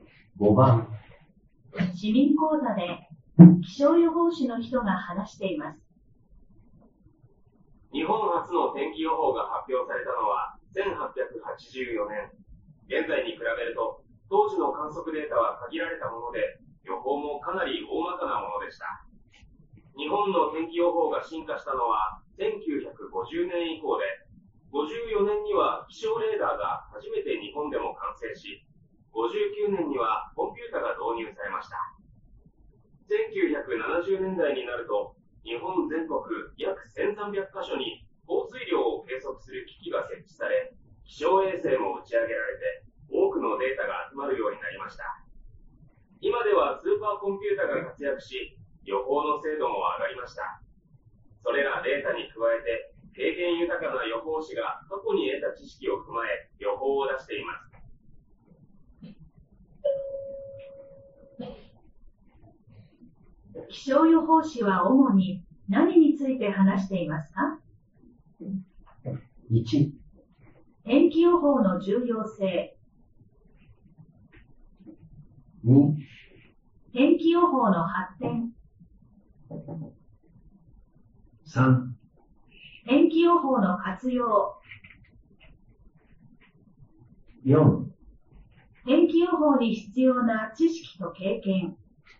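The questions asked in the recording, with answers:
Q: 気象予報士は主に何について話していますか?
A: 2: 天気予報の発展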